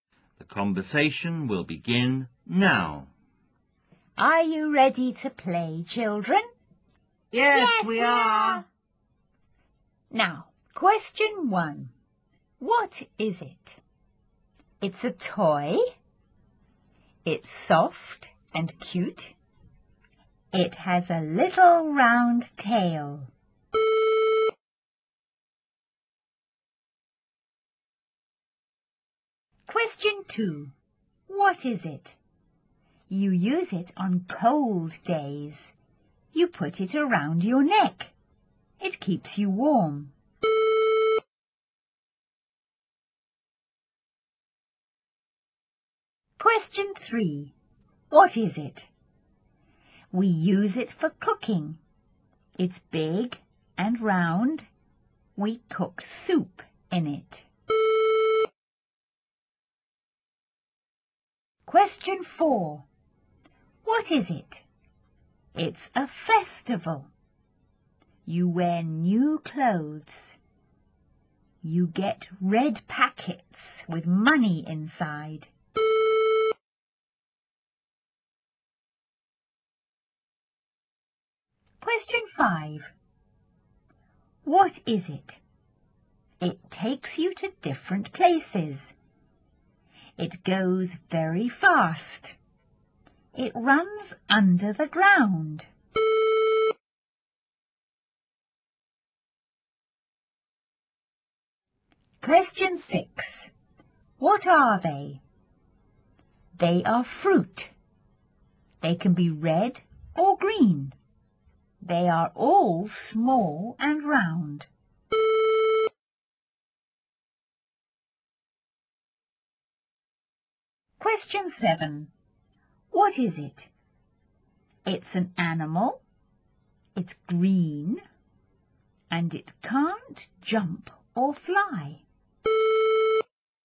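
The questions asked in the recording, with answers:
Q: What is it? You use it on cold days.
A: a scarf

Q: What is it? We use it for cooking.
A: a pot

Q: What is it? It's a festival.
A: Chinese New Year

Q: What is it? It takes you to different places.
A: the MTR (underground train)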